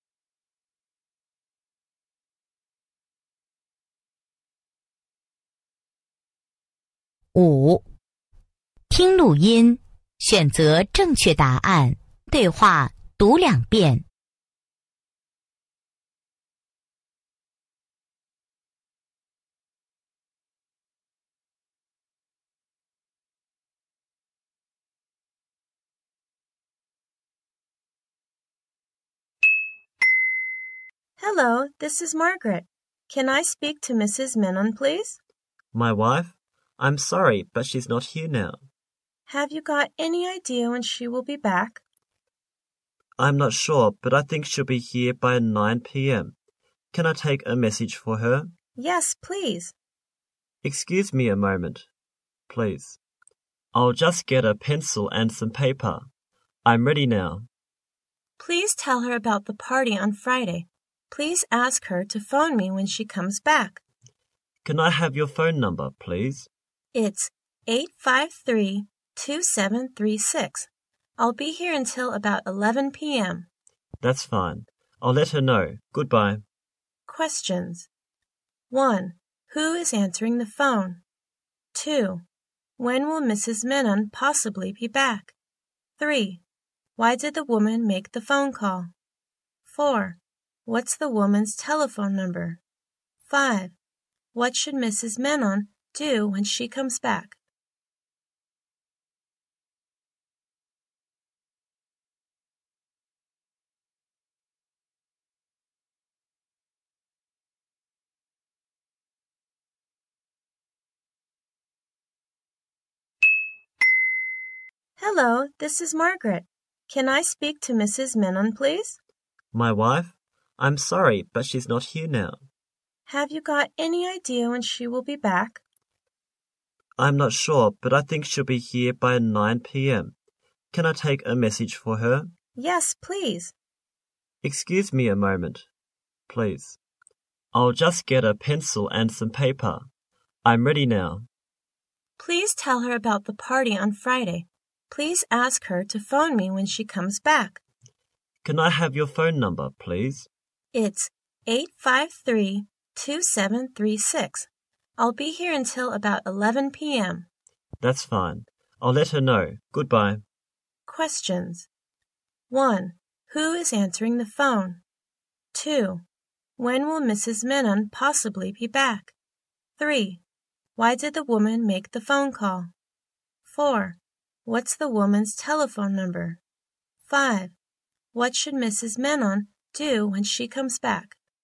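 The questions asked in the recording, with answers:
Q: Who is answering the phone?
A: Mrs. Menon's husband

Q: When will Mrs. Menon possibly be back?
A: By 9 p.m.

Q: Why did the woman make the phone call?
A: To tell her about the party on Friday

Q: What's the woman's telephone number?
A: 853-2736

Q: What should Mrs. Menon do when she comes back?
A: Phone Margaret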